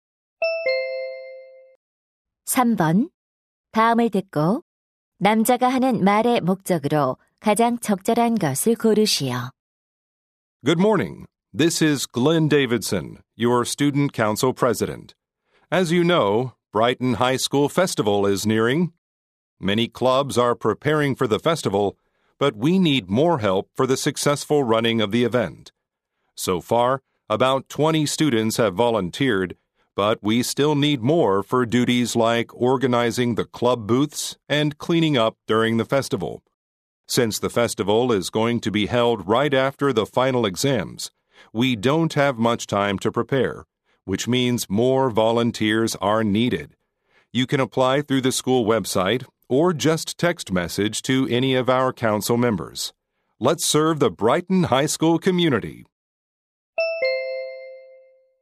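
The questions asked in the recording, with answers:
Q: 다음을 듣고 남자가 하는 말의 목적으로 가장 적절한 것을 고르시오.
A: 학교 축제 자원봉사자를 모집하려고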